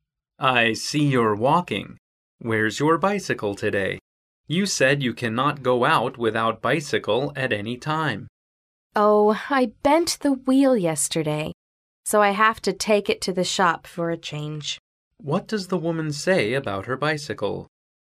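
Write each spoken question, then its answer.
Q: What does the woman say about her bicycle?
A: She bent the wheel and must take it to the shop.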